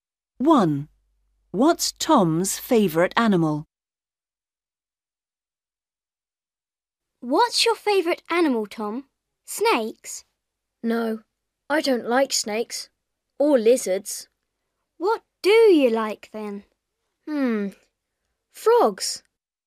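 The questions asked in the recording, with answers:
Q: What's Tom's favourite animal?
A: Frogs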